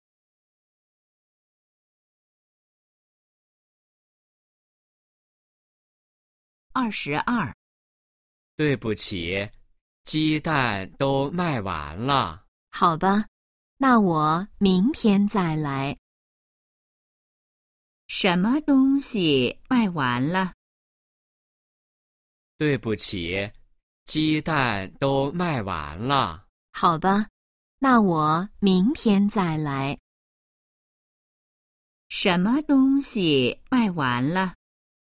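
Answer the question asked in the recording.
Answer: 鸡蛋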